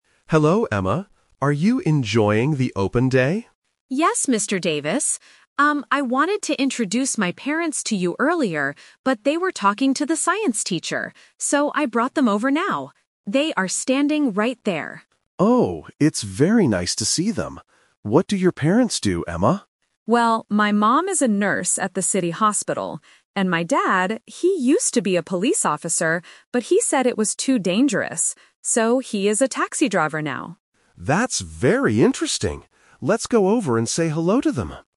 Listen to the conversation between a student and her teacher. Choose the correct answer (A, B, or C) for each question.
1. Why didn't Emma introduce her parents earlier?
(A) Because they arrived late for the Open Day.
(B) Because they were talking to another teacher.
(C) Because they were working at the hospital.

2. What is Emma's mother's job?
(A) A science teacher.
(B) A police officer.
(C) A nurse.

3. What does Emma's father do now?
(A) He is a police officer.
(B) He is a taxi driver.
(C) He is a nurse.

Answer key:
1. Because they were talking to another teacher.
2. A nurse.
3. He is a taxi driver.

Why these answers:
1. Emma says she wanted to introduce them earlier, "but they were talking to the science teacher." Option (A) is a plausible reason but not mentioned. Option (C) is a trap because the hospital is mentioned later as her mom's workplace.
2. Emma clearly states, "my mom is a nurse at the city hospital." Option (A) is a trap because the science teacher is someone the parents talked to. Option (B) is a trap because it was her dad's old job.
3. This is "The Twist". Emma says her dad "used to be a police officer... So, he is a taxi driver now." Option (A) is the trap because it was his job in the past, but the question asks what he does now. Option (C) is her mom's job.

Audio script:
Mr. Davis (Teacher): Hello, Emma. Are you enjoying the Open Day?
Emma (Student): Yes, Mr. Davis. Um, I wanted to introduce my parents to you earlier, but they were talking to the science teacher. So, I brought them over now. They are standing right there.
Mr. Davis: Oh, it's very nice to see them. What do your parents do, Emma?
Emma: Well, my mom is a nurse at the city hospital. And my dad... he used to be a police officer, but he said it was too dangerous. So, he is a taxi driver now.

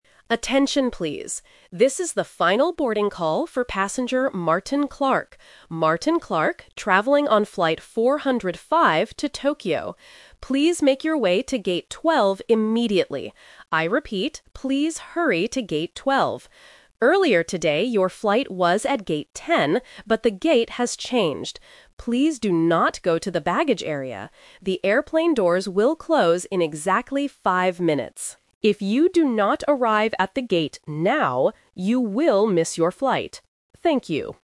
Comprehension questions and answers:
Listen to the airport announcement and choose the correct answer (A, B, or C).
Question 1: Who is this announcement for?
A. All passengers to Tokyo.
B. Passenger Martin Clark.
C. The flight attendants.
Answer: Passenger Martin Clark.

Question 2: Which gate must the passenger go to NOW?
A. Gate 10.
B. Gate 12.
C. Gate 5.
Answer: Gate 12.

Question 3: When will the airplane doors close?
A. In 5 minutes.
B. In 10 minutes.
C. In 15 minutes.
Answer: In 5 minutes.

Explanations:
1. The announcer clearly says, "This is the final boarding call for passenger Martin Clark." Option (A) is the trap because the flight is going to Tokyo, but this specific announcement is only calling one late passenger, not everyone. Option (C) is not mentioned.
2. This uses "The Twist". The passenger's flight was at "Gate 10" earlier (Option A - The Trap). However, the gate changed, so the announcer tells him to "hurry to Gate 12." Option (C) is a trap using the number "5" from the minutes.
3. The announcer gives a clear warning: "The airplane doors will close in exactly five minutes." Option (B) is a trap using the number "10" from the old gate number. Option (C) is plausible for flight announcements but is not mentioned here.

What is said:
Announcer: Attention, please. This is the final boarding call for passenger Martin Clark. Martin Clark, traveling on flight 405 to Tokyo. Please make your way to Gate 12 immediately. I repeat, please hurry to Gate 12. Earlier today, your flight was at Gate 10, but the gate has changed. Please do not go to the baggage area. The airplane doors will close in exactly five minutes. If you do not arrive at the gate now, you will miss your flight. Thank you.

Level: A2

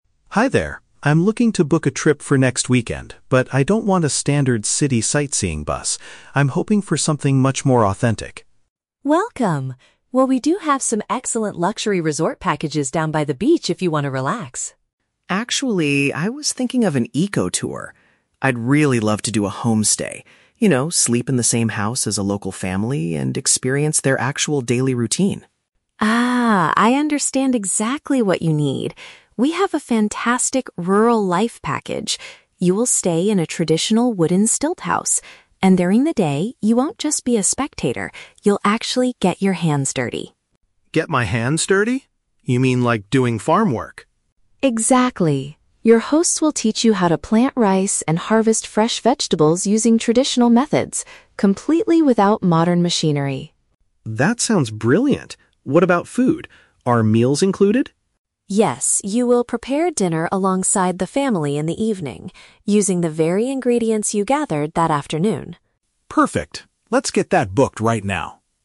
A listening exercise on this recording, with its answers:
Listen to the conversation between a tourist and a travel agent. Choose the correct answer (A, B, or C) for each question.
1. What kind of accommodation is the tourist ultimately looking for?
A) A premium room in a coastal resort.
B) A shared living space with native residents.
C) A standard hotel located in the city center.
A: A shared living space with native residents.

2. What is the main daytime activity planned for this specific tour?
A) Participating in manual agricultural labor.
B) Observing local farmers operating heavy equipment.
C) Taking photographs of traditional wooden architecture.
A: Participating in manual agricultural labor.

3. How are the evening meals handled on this trip?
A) The tourist will be taken to a famous local restaurant.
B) The tourist must purchase his own ingredients from a market.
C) The tourist will cook the food together with his hosts.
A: The tourist will cook the food together with his hosts.

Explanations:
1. Mark says he wants to do a "homestay" and "sleep in the same house as a local family" (a shared living space with native residents). Option (A) is a trap; Linh offers a luxury resort by the beach, but Mark rejects it. Option (C) is a trap; Mark explicitly says he doesn't want a "standard city sightseeing" tour.
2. Linh says Mark will "get your hands dirty" and learn to "plant rice and harvest fresh vegetables" (manual agricultural labor). Option (B) is a trap; the script explicitly states this will be done "completely without modern machinery" (no heavy equipment). Option (C) is a trap; the "wooden stilt house" is where he will sleep, not just photograph.
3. Linh confirms that Mark will "prepare dinner alongside the family" (cook the food together with his hosts). Option (A) is a plausible tourist activity, but it is not mentioned. Option (B) is a trap; he doesn't buy ingredients at a market, he uses the ingredients he "gathered that afternoon" from the farm.

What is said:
Mark: Hi there. I'm looking to book a trip for next weekend, but I don't want a standard city sightseeing bus. I'm hoping for something much more authentic.
Linh: Welcome! Well, we do have some excellent luxury resort packages down by the beach if you want to relax.
Mark: Actually, I was thinking of an eco-tour. I'd really love to do a homestay—you know, sleep in the same house as a local family and experience their actual daily routine.
Linh: Ah, I understand exactly what you need. We have a fantastic "Rural Life" package. You will stay in a traditional wooden stilt house. And during the day, you won't just be a spectator; you'll actually get your hands dirty.
Mark: Get my hands dirty? You mean like doing farm work?
Linh: Exactly! Your hosts will teach you how to plant rice and harvest fresh vegetables using traditional methods, completely without modern machinery.
Mark: That sounds brilliant! What about food? Are meals included?
Linh: Yes, you will prepare dinner alongside the family in the evening, using the very ingredients you gathered that afternoon.

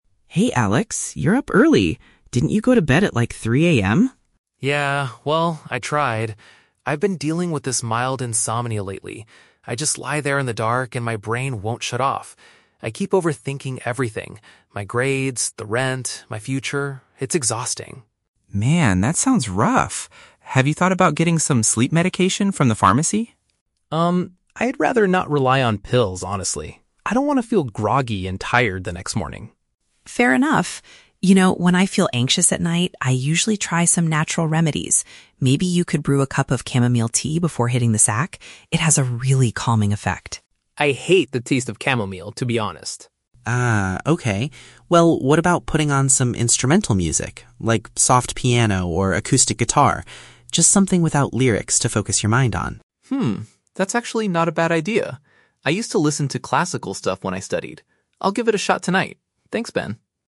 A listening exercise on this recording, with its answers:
Listen to a conversation between two roommates and choose the correct answer (A, B, or C) for each question.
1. Why is Alex having trouble sleeping?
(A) He cannot stop worrying about various things in his life.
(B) He is staying up late to study for his university exams.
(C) He has been drinking too much coffee in the evenings.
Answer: He cannot stop worrying about various things in his life.

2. What is Alex's opinion on using sleep medication?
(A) He thinks the medication is too expensive to buy.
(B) He wants to avoid it because of the negative aftereffects.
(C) He tried using it before, but it did not help him sleep.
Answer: He wants to avoid it because of the negative aftereffects.

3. Which solution does Alex agree to try tonight?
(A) Drinking a warm cup of herbal tea before bed.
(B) Listening to relaxing tracks with no singing.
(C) Reading a textbook instead of using his phone.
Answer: Listening to relaxing tracks with no singing.

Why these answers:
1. The Key: Alex says his "brain won't shut off" and he keeps "overthinking everything" (grades, rent, future). This is paraphrased as "cannot stop worrying about various things". The Trap (B): "Grades" and "studied" are mentioned in the audio, but he is not staying up to study; he is staying up because he is overthinking. Plausible Trap (C): Coffee is a common cause of insomnia, but it is never mentioned in the conversation.
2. The Key: Alex says he'd "rather not rely on pills" because he doesn't want to "feel groggy and tired the next morning". This matches "negative aftereffects". The Trap (C): He rejects the idea of using medication, but he never says he actually tried it before (mentioned but wrong context). Plausible Trap (A): The cost of medication is a realistic concern, but it is not mentioned in the audio.
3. The Key: Ben suggests "instrumental music" (something "without lyrics"), and Alex says "I'll give it a shot tonight". This is paraphrased as "relaxing tracks with no singing". The Trap (A): Chamomile tea (herbal tea) is explicitly mentioned by Ben, but Alex rejects it because he hates the taste (mentioned but rejected). Plausible Trap (C): Reading a book is a common sleep remedy, but it is not mentioned by either speaker.

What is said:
Ben: Hey, Alex. You're up early. Didn't you go to bed at, like, 3 AM?
Alex: Yeah, well, I tried. I've been dealing with this mild insomnia lately. I just lie there in the dark, and my brain won't shut off. I keep overthinking everything—my grades, the rent, my future... it's exhausting.
Ben: Man, that sounds rough. Have you thought about getting some sleep medication from the pharmacy?
Alex: Um, I'd rather not rely on pills, honestly. I don't want to feel groggy and tired the next morning.
Ben: Fair enough. You know, when I feel anxious at night, I usually try some natural remedies. Maybe you could brew a cup of chamomile tea before hitting the sack? It has a really calming effect.
Alex: I hate the taste of chamomile, to be honest.
Well, what about putting on some instrumental music? Like, soft piano or acoustic guitar. Just something without lyrics to focus your mind on.
Alex: Hmm, that's actually not a bad idea. I used to listen to classical stuff when I studied. I'll give it a shot tonight. Thanks, Ben.

